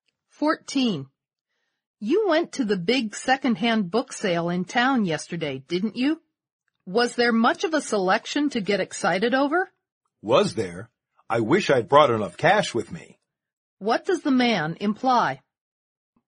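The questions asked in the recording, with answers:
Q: What does the man imply?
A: There was a great selection, and he wished he'd had more money to buy more books.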